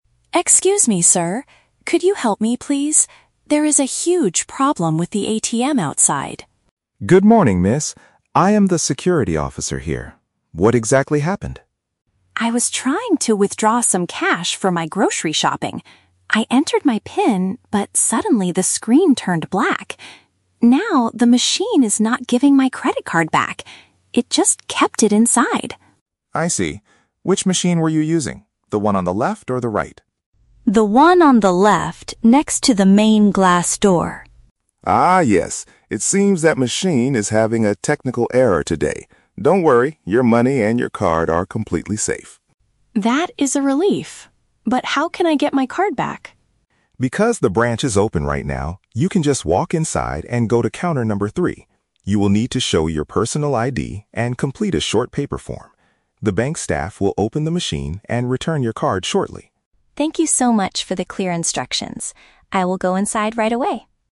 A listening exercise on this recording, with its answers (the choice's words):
Listen to a conversation between a bank customer and a security guard. For each question, choose the correct answer (A, B, or C).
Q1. What is the main issue the customer is experiencing?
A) She forgot her secret PIN while trying to pay for her groceries.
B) The outdoor cash dispenser did not return her physical card.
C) The security guard stopped her from entering the main glass door.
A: The outdoor cash dispenser did not return her physical card.

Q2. What was the customer doing when the machine broke down?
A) She was attempting to take paper money out of her account.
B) She was transferring funds online to pay for her daily food.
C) She was trying to print a receipt for a previous transaction.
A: She was attempting to take paper money out of her account.

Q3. What does the security officer instruct the customer to do next?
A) Wait outside until the broken machine automatically restarts.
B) Provide her identification and fill out a written document inside.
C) Call the bank's emergency hotline from her mobile phone immediately.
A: Provide her identification and fill out a written document inside.

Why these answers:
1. Sarah complains that "the machine is not giving my credit card back" (the cash dispenser did not return her physical card). Option (A) is a trap; she mentions her "PIN" and "grocery shopping," but she didn't forget her password. Option (C) is a trap; the "glass door" is just a location marker for the ATM, and the guard is actually helping her.
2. Sarah states, "I was trying to withdraw some cash" (take paper money out of her account). Option (B) is a trap; she needed the cash for grocery shopping, but she was not doing an online fund transfer. Option (C) is never mentioned.
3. James tells her to go inside, "show your personal ID" (provide identification) and "complete a short paper form" (fill out a written document). Option (A) is a trap; the machine is broken, but he doesn't tell her to wait for a restart. Option (C) is a common real-world solution, but in this case, the branch is open so she can just walk inside.

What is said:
Sarah: Excuse me, sir? Could you help me, please? There is a huge problem with the ATM outside.
James: Good morning, miss. I am the security officer here. What exactly happened?
Sarah: I was trying to withdraw some cash for my grocery shopping. I entered my PIN, but suddenly the screen turned black. Now, the machine is not giving my credit card back. It just kept it inside!
James: I see. Which machine were you using? The one on the left or the right?
Sarah: The one on the left, next to the main glass door.
James: Ah, yes. It seems that machine is having a technical error today. Don't worry, your money and your card are completely safe.
Sarah: That is a relief. But how can I get my card back?
James: Because the branch is open right now, you can just walk inside and go to counter number three. You will need to show your personal ID and complete a short paper form. The bank staff will open the machine and return your card shortly.